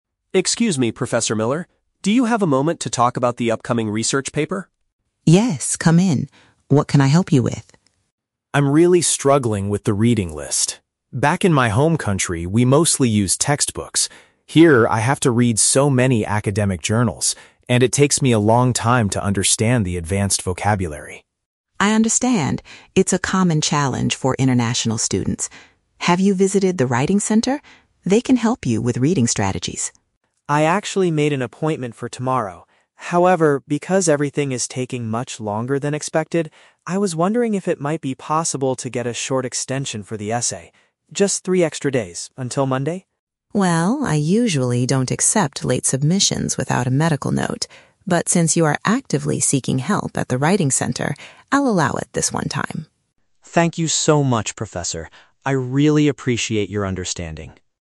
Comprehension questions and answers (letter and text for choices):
Listen to the conversation between an international student and his professor. Read the questions below and choose the correct answer (A, B, or C) for each.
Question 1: What is the main reason the student is experiencing difficulty with the assignment?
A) He cannot find the required textbooks in the university library.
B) He reads slowly because the scholarly articles contain complex words.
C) He is currently suffering from a serious medical condition.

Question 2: What has the student already done to improve his situation?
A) He has scheduled a meeting with a campus support service.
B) He asked his classmates to explain the reading strategies.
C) He translated all the journals into his native language.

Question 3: Why does the professor agree to change the deadline?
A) Because the student provided an official document from a doctor.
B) Because this is the first written assignment of the entire semester.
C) Because the student is taking proactive steps to get academic assistance.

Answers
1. B) He reads slowly because the scholarly articles contain complex words.
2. A) He has scheduled a meeting with a campus support service.
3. C) Because the student is taking proactive steps to get academic assistance.

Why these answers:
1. The Key (Correct): The student explains that he has to read "academic journals" and it takes a long time to understand the "advanced vocabulary." (Paraphrased: academic journals = scholarly articles, advanced vocabulary = complex words, takes a long time = reads slowly). The Trap: Option (A) is incorrect. He mentions "textbooks", but he says he used them back in his home country, not that he can't find them here. Not mentioned: Option (C) is a trap based on the professor later mentioning a "medical note," but the student is not sick.
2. The Key (Correct): The student says, "I actually made an appointment for tomorrow" at the writing center. (Paraphrased: writing center = campus support service, made an appointment = scheduled a meeting). The Trap: Option (B) is a logical thing a student might do, but he never mentions asking his classmates for help. Not mentioned: Option (C) is not mentioned at all in the audio.
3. The Key (Correct): The professor agrees to the 3-day extension "since you are actively seeking help at the writing center." (Paraphrased: actively seeking help = taking proactive steps to get academic assistance). The Trap: Option (A) is incorrect because the professor specifically notes that he usually requires a medical note (official document from a doctor), but is making an exception this time even though the student doesn't have one. Not mentioned: Option (B) is a plausible reason for a professor to be lenient, but it is not mentioned in the dialogue.

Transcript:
Student: Excuse me, Professor Miller. Do you have a moment to talk about the upcoming research paper?
Professor: Yes, come in. What can I help you with?
Student: I'm really struggling with the reading list. Back in my home country, we mostly used textbooks. Here, I have to read so many academic journals, and it takes me a long time to understand the advanced vocabulary.
Professor: I understand. It's a common challenge for international students. Have you visited the writing center? They can help you with reading strategies.
Student: I actually made an appointment for tomorrow. However, because everything is taking much longer than expected, I was wondering if it might be possible to get a short extension for the essay? Just three extra days, until Monday?
Professor: Well, I usually don't accept late submissions without a medical note. But since you are actively seeking help at the writing center, I'll allow it this one time.